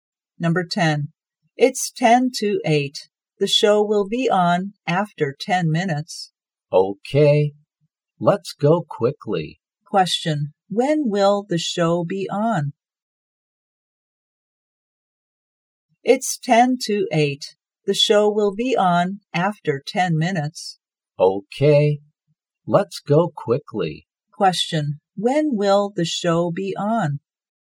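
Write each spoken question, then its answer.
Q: When will the show be on?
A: At 8 o'clock.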